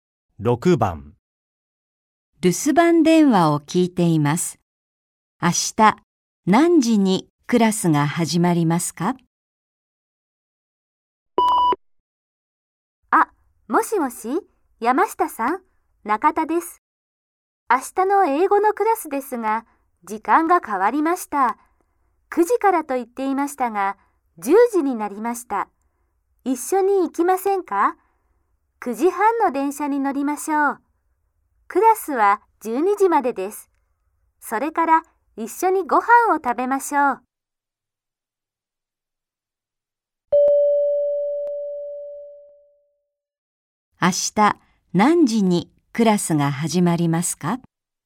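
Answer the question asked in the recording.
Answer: 10時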